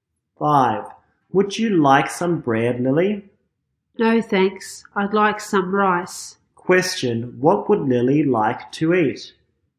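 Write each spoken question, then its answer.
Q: What would Lily like to eat?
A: Rice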